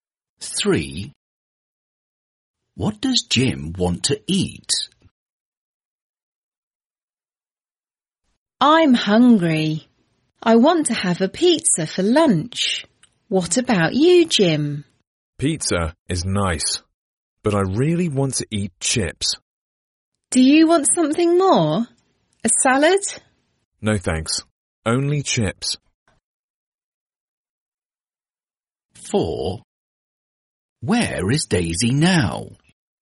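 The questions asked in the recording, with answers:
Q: What does Jim want to eat?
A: chips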